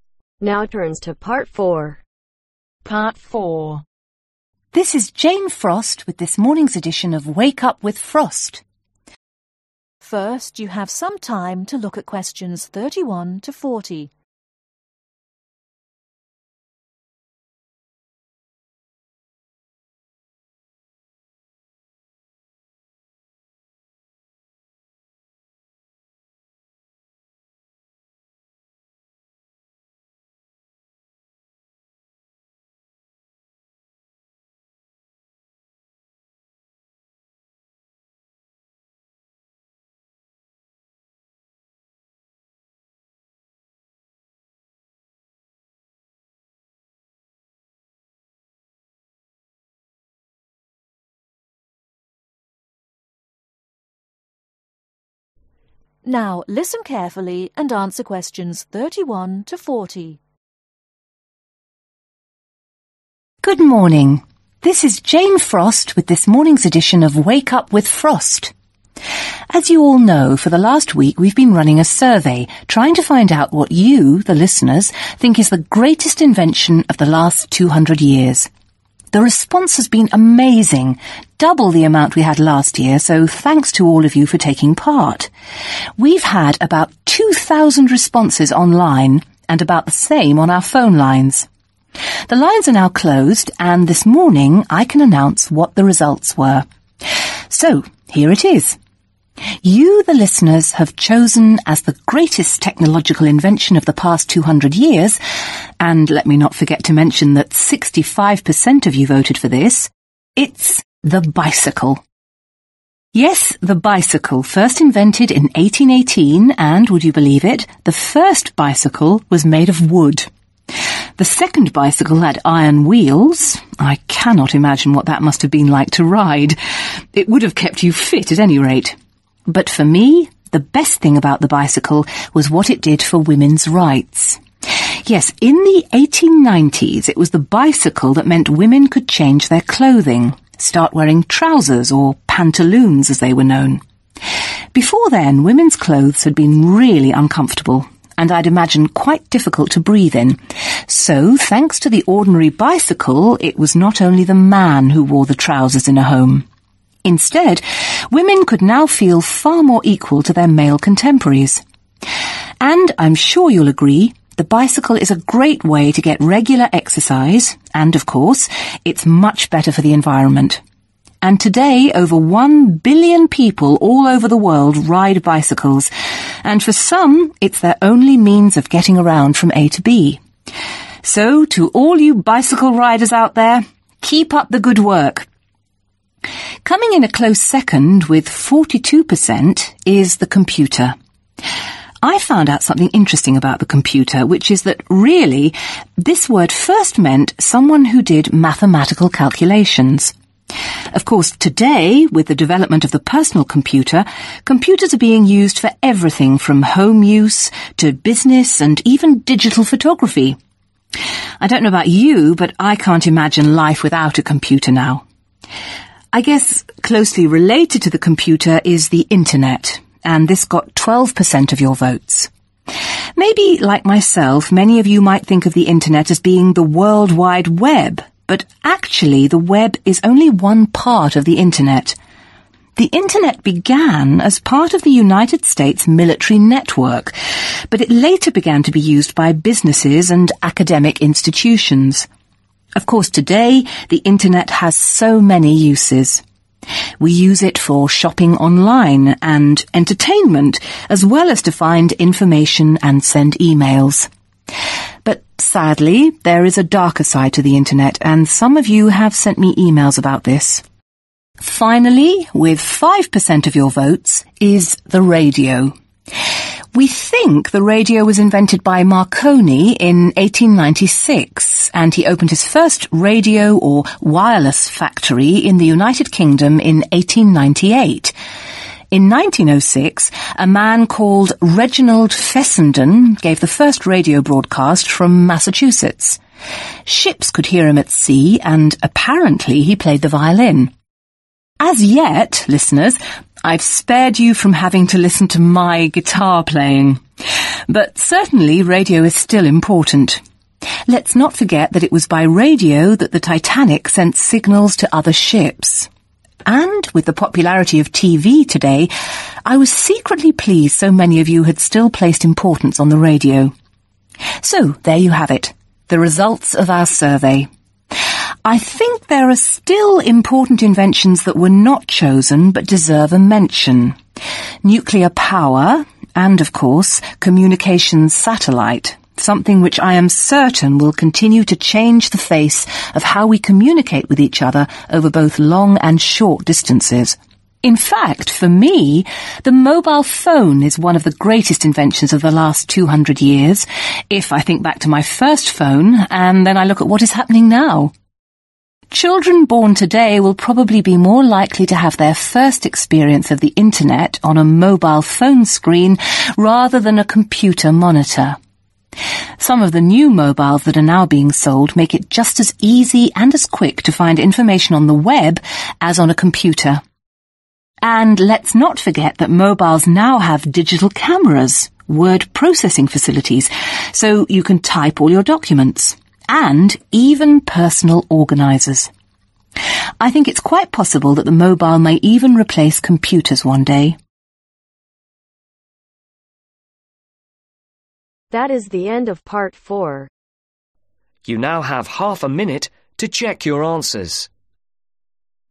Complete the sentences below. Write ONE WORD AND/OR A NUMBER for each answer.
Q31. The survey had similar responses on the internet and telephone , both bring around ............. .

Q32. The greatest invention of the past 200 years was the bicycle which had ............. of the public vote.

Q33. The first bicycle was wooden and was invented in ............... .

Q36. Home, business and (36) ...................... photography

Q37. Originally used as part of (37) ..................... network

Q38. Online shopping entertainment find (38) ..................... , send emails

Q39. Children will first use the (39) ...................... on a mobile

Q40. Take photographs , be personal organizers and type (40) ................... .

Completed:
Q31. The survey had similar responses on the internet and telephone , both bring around 2,000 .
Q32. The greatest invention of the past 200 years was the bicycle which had 65% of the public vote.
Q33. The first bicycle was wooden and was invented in 1818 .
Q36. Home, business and DIGITAL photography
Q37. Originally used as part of MILITARY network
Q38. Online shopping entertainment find INFORMATION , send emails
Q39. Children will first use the INTERNET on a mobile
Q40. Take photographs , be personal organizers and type DOCUMENTS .